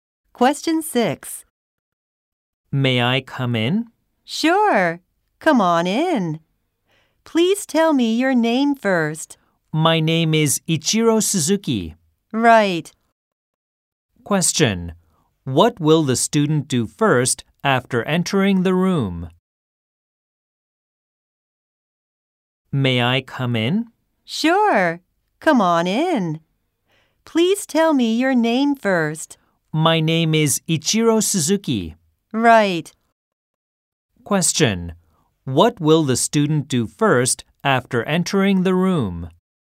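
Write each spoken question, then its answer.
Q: What will the student do first after entering the room?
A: Tell his name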